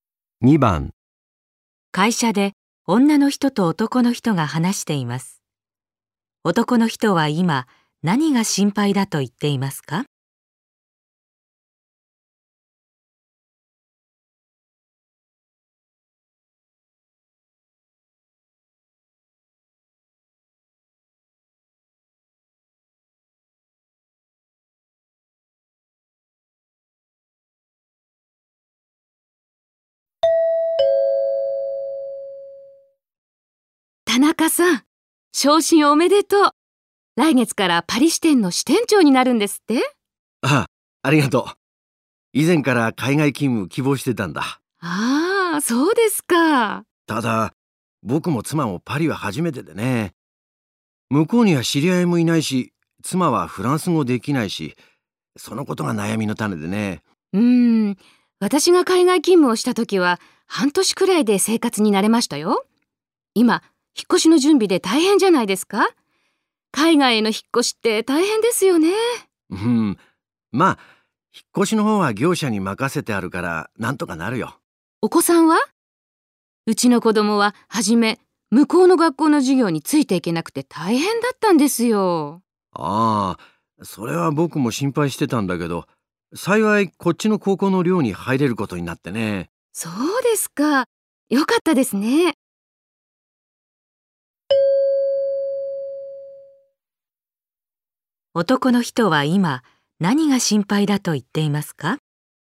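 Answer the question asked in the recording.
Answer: パリに知り合いがいないし、妻がフランス語ができないこと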